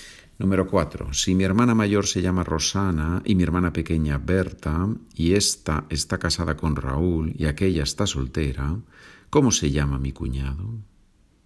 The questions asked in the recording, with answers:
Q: Si mi hermana mayor se llama Rosana y mi hermana pequeña Berta y esta está casada con Raúl y aquella está soltera, ¿cómo se llama mi cuñado?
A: Mi cuñado se llama Raúl.